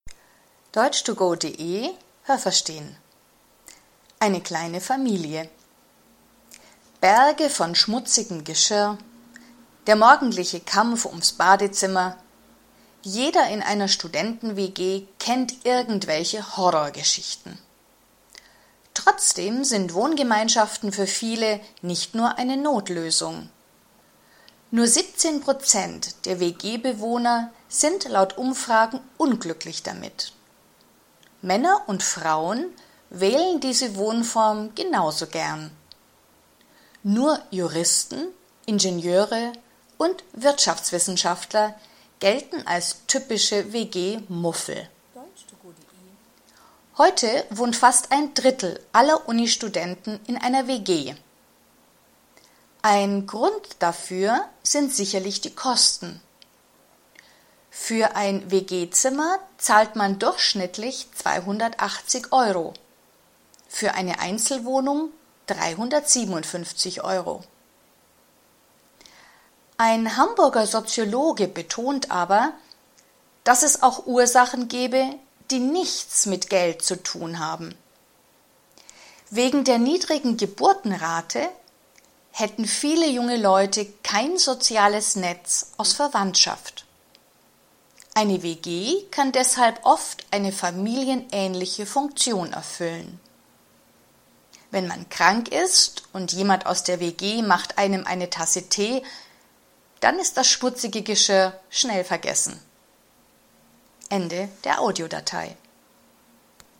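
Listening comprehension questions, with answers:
Haben Sie das gehört? Stimmt diese Aussage?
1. Die meisten Menschen, die in einer Wohngemeinschaft leben, wohnen gern in einer WG.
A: Ja, das habe ich gehört.

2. Frauen wohnen lieber in Wohngemeinschaften als Männer.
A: Nein, das habe ich nicht gehört.

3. Juristen, Ingenieure und Wirtschaftswissenschaftler leben besonders gern in WGs.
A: Nein, das habe ich nicht gehört.

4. Circa 30 Prozent aller Uni-Studenten leben in einer Wohngemeinschaft.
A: Ja, das habe ich gehört.

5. Eine Einzelwohnung kostet im Durchschnitt 357 Euro mehr als ein WG-Zimmer.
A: Nein, das habe ich nicht gehört.

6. Wegen der niedrigen Geburtenrate haben viele Leute heute nur wenige Verwandte.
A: Ja, das habe ich gehört.

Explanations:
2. Männer und Frauen wählen diese Wohnform genauso gern.
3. Sie sind WG-Muffel, das heißt, sie mögen Wohngemeinschaften nicht.
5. Eine Einzelwohnung kostet im Durchschnitt 357 Euro, ein WG-Zimmer 280 Euro.

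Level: B1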